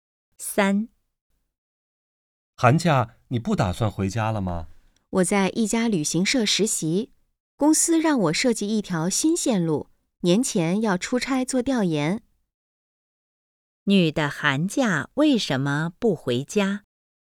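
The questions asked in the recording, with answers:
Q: 女的寒假为什么不回家?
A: 她在旅行社实习,年前要出差做调研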